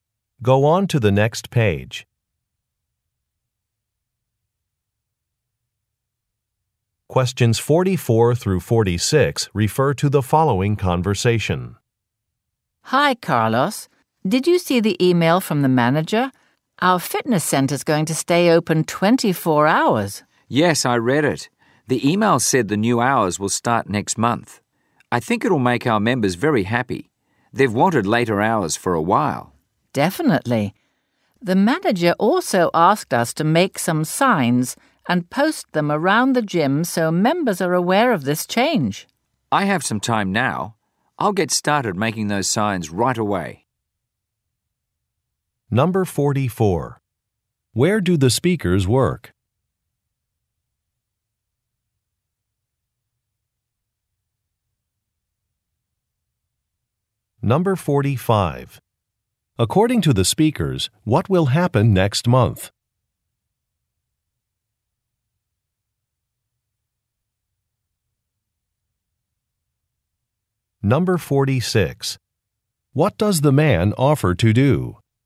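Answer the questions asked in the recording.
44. At a fitness center (gym)
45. The fitness center will start staying open 24 hours
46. Make signs about the change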